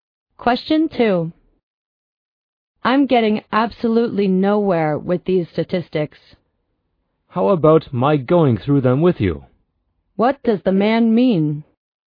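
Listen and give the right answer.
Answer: He offers to help the woman with the statistics.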